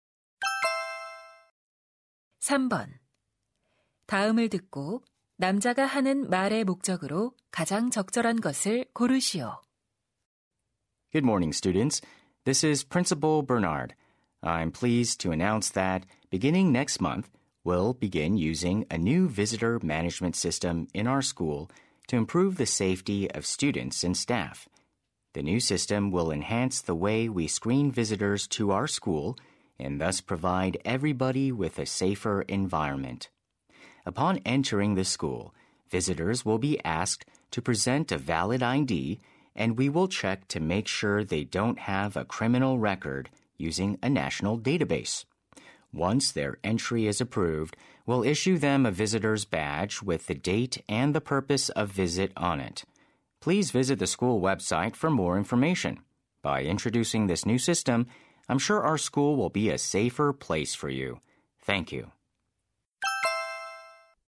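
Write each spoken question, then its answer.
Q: 다음을 듣고 남자가 하는 말의 목적으로 가장 적절한 것을 고르시오.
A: 새로운 방문객 관리 시스템 도입을 알리려고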